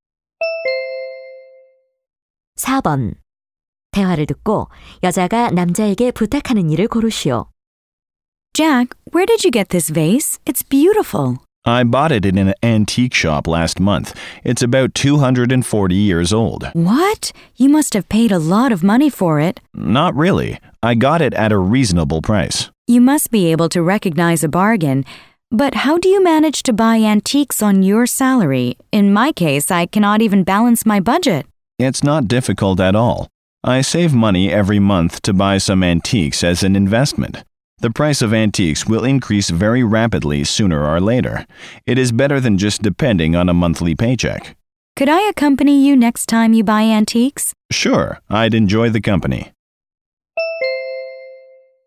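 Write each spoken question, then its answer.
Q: 대화를 듣고 여자가 남자에게 부탁하는 일을 고르시오.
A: 다음에 골동품을 살 때 같이 가게 해 달라는 것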